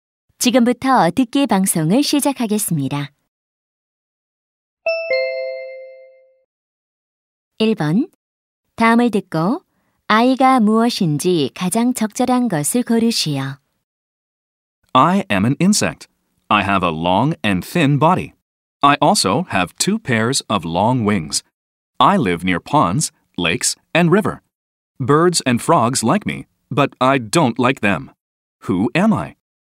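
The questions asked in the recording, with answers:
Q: 다음을 듣고 아이가 무엇인지 가장 적절한 것을 고르시오.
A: 잠자리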